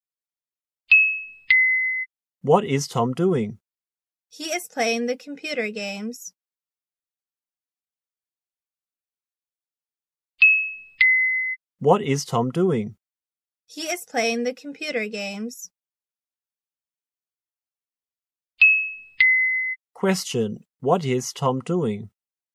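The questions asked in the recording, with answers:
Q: Question, what is Tom doing?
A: He is playing computer games.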